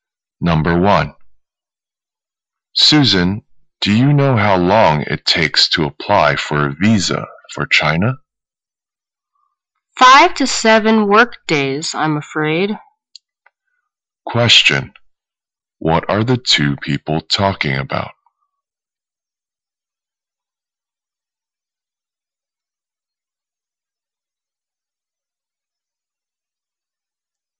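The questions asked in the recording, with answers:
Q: What are the 2 people talking about?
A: How long it takes to apply for a visa for China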